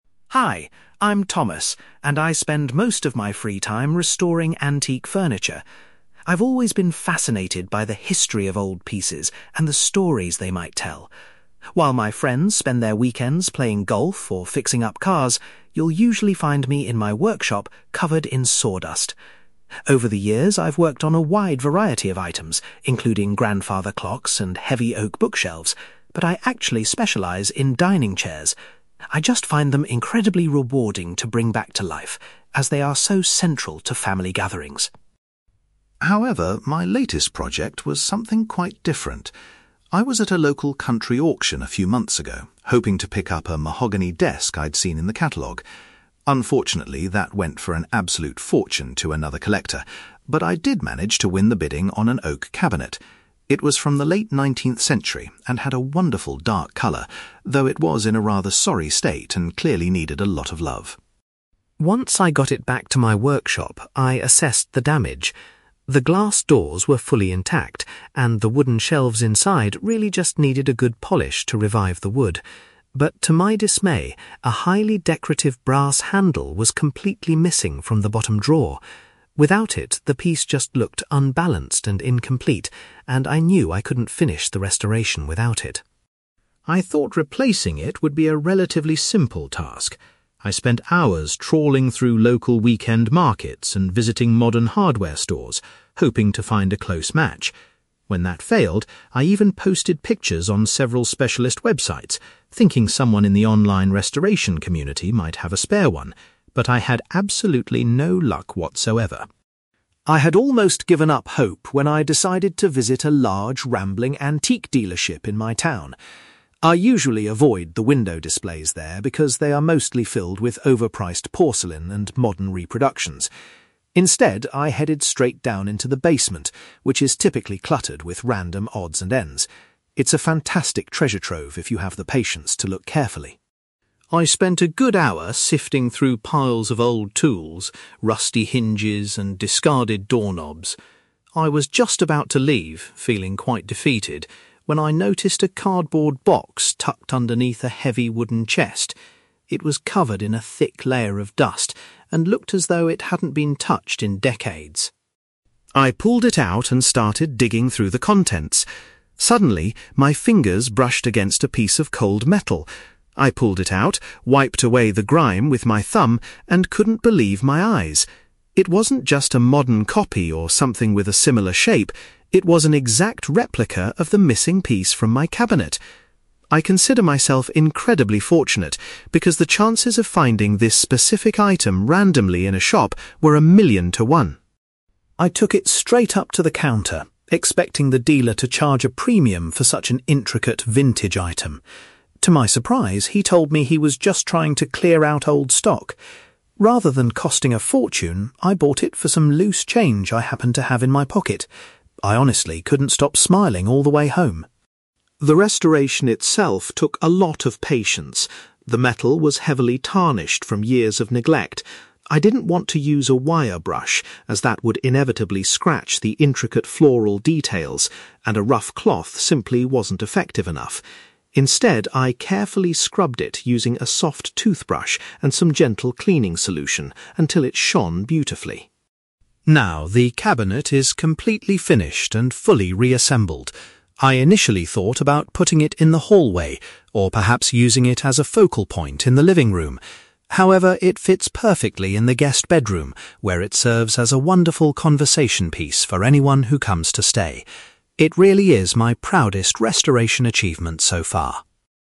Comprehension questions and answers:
You will hear a man called Thomas giving a presentation about his hobby of restoring antique furniture. For questions 9-18, complete the sentences with a word or short phrase.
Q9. Thomas normally focuses his restoration work on (9)........................... despite having worked on other furniture.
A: dining chairs

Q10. At a recent auction, Thomas was successful in buying an (10)........................... rather than the desk he originally wanted.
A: oak cabinet

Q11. Thomas was disappointed to discover that a (11)........................... had been lost from the bottom drawer.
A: brass handle

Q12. Thomas tried asking for help on some (12)........................... but did not find what he was looking for.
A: specialist websites

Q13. In the local antique shop, Thomas went to look in the (13)........................... because it usually has interesting items.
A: basement

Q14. Thomas spotted a dusty (14)........................... hidden below a large piece of furniture.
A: cardboard box

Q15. Thomas felt extremely lucky because the item he pulled out of the dirt was an (15)........................... of the part he needed.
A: exact replica

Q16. Thomas was amazed that the shop owner only asked for some (16)........................... to pay for the item.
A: loose change

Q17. To avoid damaging the details, Thomas chose to clean the metal with a (17)........................... .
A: soft toothbrush

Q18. Thomas finally decided to place the restored piece of furniture in his (18)........................... .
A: guest bedroom

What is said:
Thomas: Hi, I'm Thomas, and I spend most of my free time restoring antique furniture. I've always been fascinated by the history of old pieces and the stories they might tell. While my friends spend their weekends playing golf or fixing up cars, you'll usually find me in my workshop covered in sawdust. Over the years, I've worked on a wide variety of items, including grandfather clocks and heavy oak bookshelves, but I actually specialize in dining chairs. I just find them incredibly rewarding to bring back to life, as they are so central to family gatherings.
However, my latest project was something quite different. I was at a local country auction a few months ago, hoping to pick up a mahogany desk I'd seen in the catalogue. Unfortunately, that went for an absolute fortune to another collector, but I did manage to win the bidding on an oak cabinet. It was from the late nineteenth century and had a wonderful dark color, though it was in a rather sorry state and clearly needed a lot of love.
Once I got it back to my workshop, I assessed the damage. The glass doors were fully intact, and the wooden shelves inside really just needed a good polish to revive the wood. But to my dismay, a highly decorative brass handle was completely missing from the bottom drawer. Without it, the piece just looked unbalanced and incomplete, and I knew I couldn't finish the restoration without it.
I thought replacing it would be a relatively simple task. I spent hours trawling through local weekend markets and visiting modern hardware stores, hoping to find a close match. When that failed, I even posted pictures on several specialist websites, thinking someone in the online restoration community might have a spare one. But I had absolutely no luck whatsoever.
I had almost given up hope when I decided to visit a large, rambling antique dealership in my town. I usually avoid the window displays there because they are mostly filled with overpriced porcelain and modern reproductions. Instead, I headed straight down into the basement, which is typically cluttered with random odds and ends. It's a fantastic treasure trove if you have the patience to look carefully.
I spent a good hour sifting through piles of old tools, rusty hinges, and discarded doorknobs. I was just about to leave, feeling quite defeated, when I noticed a cardboard box tucked underneath a heavy wooden chest. It was covered in a thick layer of dust and looked as though it hadn't been touched in decades.
I pulled it out and started digging through the contents. Suddenly, my fingers brushed against a piece of cold metal. I pulled it out, wiped away the grime with my thumb, and couldn't believe my eyes. It wasn't just a modern copy or something with a similar shape; it was an exact replica of the missing piece from my cabinet! I consider myself incredibly fortunate because the chances of finding this specific item randomly in a shop were a million to one.
I took it straight up to the counter, expecting the dealer to charge a premium for such an intricate, vintage item. To my surprise, he told me he was just trying to clear out old stock. Rather than costing a fortune, I bought it for some loose change I happened to have in my pocket. I honestly couldn't stop smiling all the way home.
The restoration itself took a lot of patience. The metal was heavily tarnished from years of neglect. I didn't want to use a wire brush, as that would inevitably scratch the intricate floral details, and a rough cloth simply wasn't effective enough. Instead, I carefully scrubbed it using a soft toothbrush and some gentle cleaning solution until it shone beautifully.
Now, the cabinet is completely finished and fully reassembled. I initially thought about putting it in the hallway, or perhaps using it as a focal point in the living room. However, it fits perfectly in the guest bedroom, where it serves as a wonderful conversation piece for anyone who comes to stay. It really is my proudest restoration achievement so far.

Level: B2